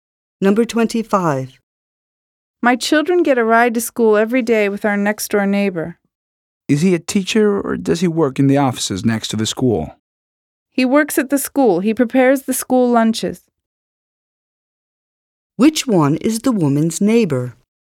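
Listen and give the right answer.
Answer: The school cook who prepares lunches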